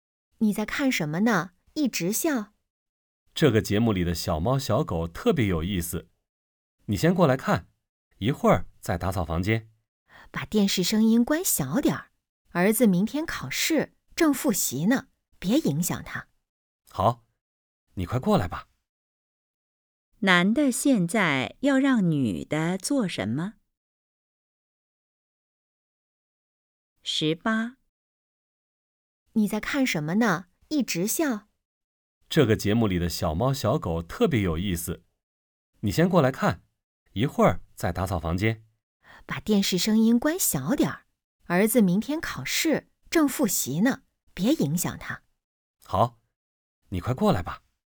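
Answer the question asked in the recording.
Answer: 过来看电视节目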